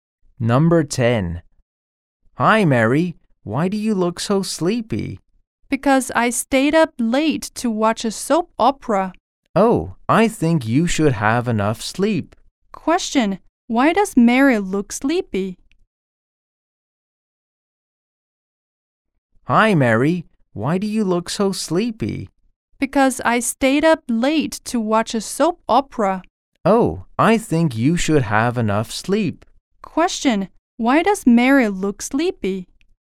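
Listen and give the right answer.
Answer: Because she stayed up late to watch a soap opera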